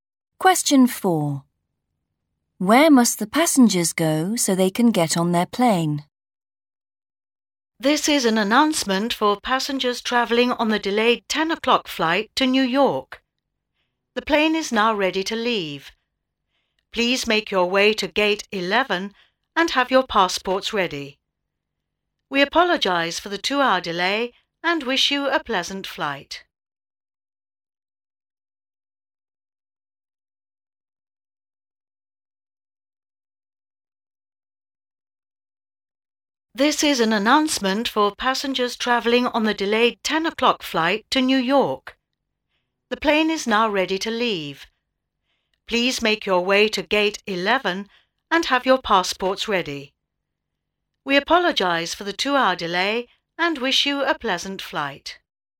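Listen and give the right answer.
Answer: gate 11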